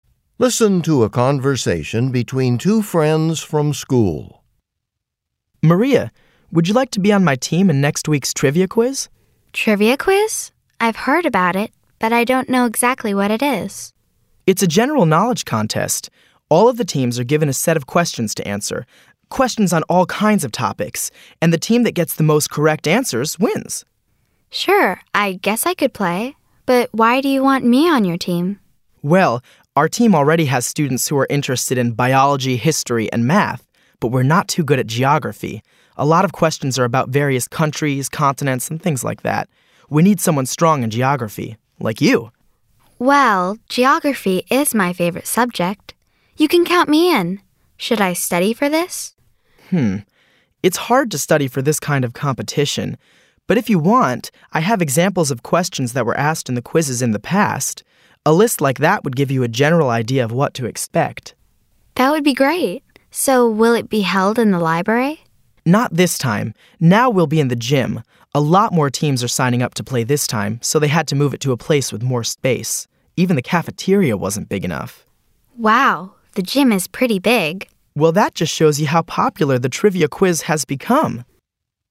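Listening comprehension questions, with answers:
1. What does the boy ask the girl to do?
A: Join a team

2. What subject is the girl interested in?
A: Geography

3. What does the boy offer to give the girl?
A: A list of questions

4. Where will the event be held this year?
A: In the gym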